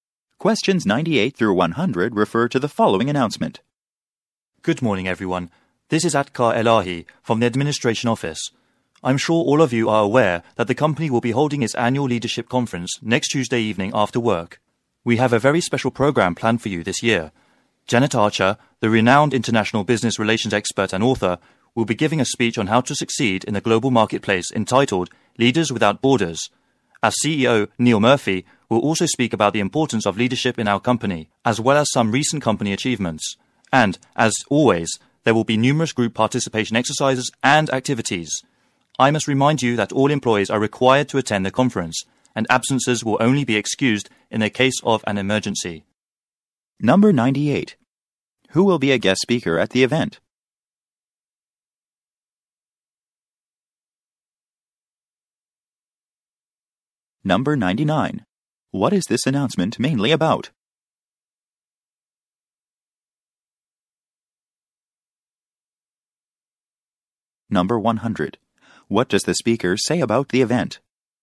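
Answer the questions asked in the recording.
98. Janet Archer, a business relations expert and author
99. The annual leadership conference
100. All employees are required to attend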